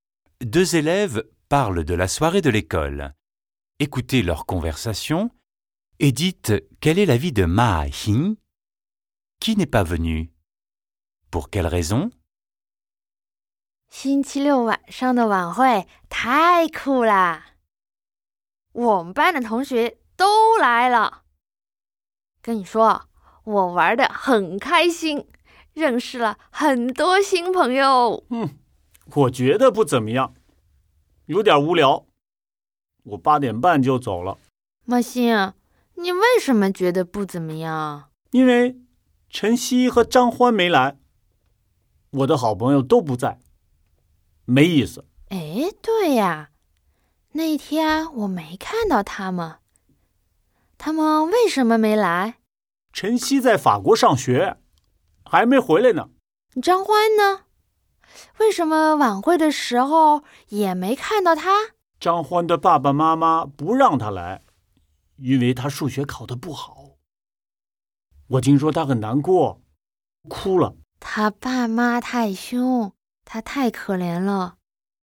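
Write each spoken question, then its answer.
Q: Écoutez leur conversation et dites quel est l'avis de Ma Hing.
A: Elle a trouvé la soirée pas terrible, un peu ennuyeuse (elle est partie à 8h30).

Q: Qui n'est pas venu? Pour quelle raison?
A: Chen Xi est toujours à l'école en France et n'est pas encore rentrée ; les parents de Zhang Huan ne l'ont pas laissé venir parce qu'il a eu une mauvaise note en maths.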